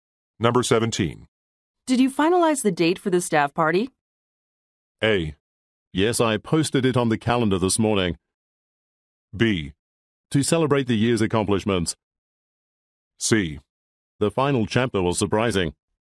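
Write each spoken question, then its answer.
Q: Did you finalize the date for the staff party?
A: A: Yes, I posted it on the calendar this morning.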